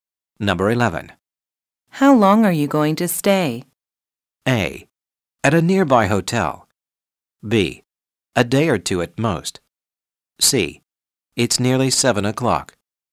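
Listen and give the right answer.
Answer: B: A day or two at most.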